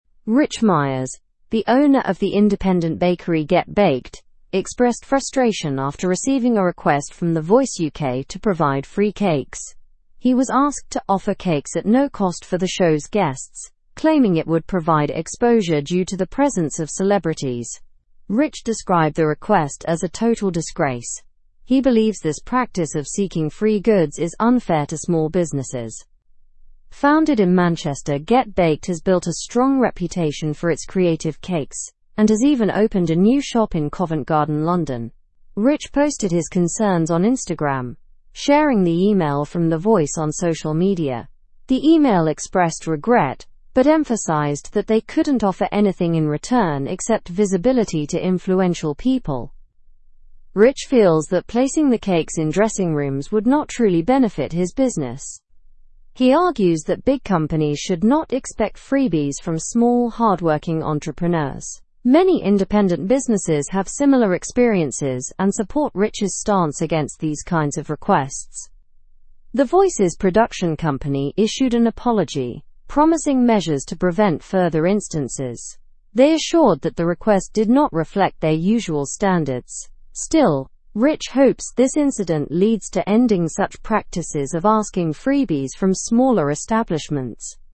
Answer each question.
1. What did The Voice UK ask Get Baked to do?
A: The Voice UK asked Get Baked to provide free cakes.

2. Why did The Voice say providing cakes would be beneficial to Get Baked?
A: They claimed it would provide exposure due to the presence of celebrities.

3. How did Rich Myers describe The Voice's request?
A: He described the request as "a total disgrace."

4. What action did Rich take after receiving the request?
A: He posted about it on Instagram and shared the email.

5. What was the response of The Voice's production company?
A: They issued an apology and promised preventive measures for the future.

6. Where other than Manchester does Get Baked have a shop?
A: Get Baked also has a shop in Covent Garden, London.

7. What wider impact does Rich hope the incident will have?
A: Rich hopes it will stop requests for freebies from small businesses.

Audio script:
Rich Myers, the owner of the independent bakery Get Baked, expressed frustration after receiving a request from The Voice UK to provide free cakes. He was asked to offer cakes at no cost for the show's guests, claiming it would provide exposure due to the presence of celebrities. Rich described the request as "a total disgrace." He believes this practice of seeking free goods is unfair to small businesses.
Founded in Manchester, Get Baked has built a strong reputation for its creative cakes and has even opened a new shop in Covent Garden, London. Rich posted his concerns on Instagram, sharing the email from The Voice on social media. The email expressed regret but emphasized that they couldn't offer anything in return except visibility to influential people.
Rich feels that placing the cakes in dressing rooms would not truly benefit his business. He argues that big companies should not expect freebies from small, hardworking entrepreneurs. Many independent businesses have similar experiences and support Rich's stance against these kinds of requests.
The Voice's production company issued an apology, promising measures to prevent further instances. They assured that the request did not reflect their usual standards. Still, Rich hopes this incident leads to ending such practices of asking freebies from smaller establishments.

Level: Level 3